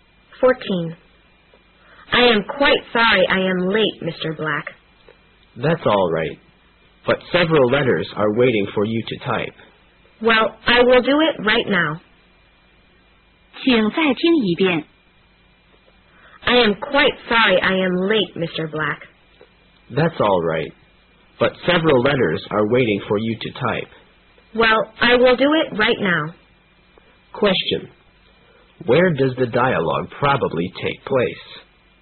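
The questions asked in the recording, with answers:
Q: Where does the dialogue probably take place?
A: In an office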